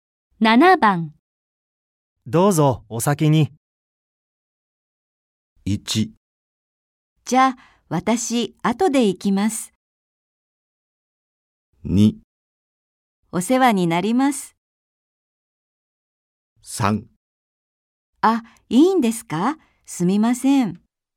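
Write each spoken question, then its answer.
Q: どうぞ、お先に。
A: 3: あ、いいんですか?すみません。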